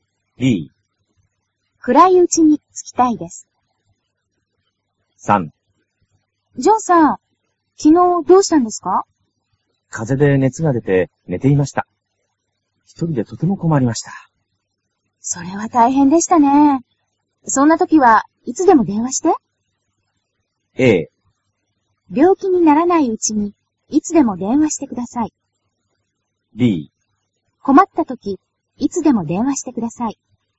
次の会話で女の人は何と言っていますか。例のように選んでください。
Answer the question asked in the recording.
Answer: b

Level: cơ bản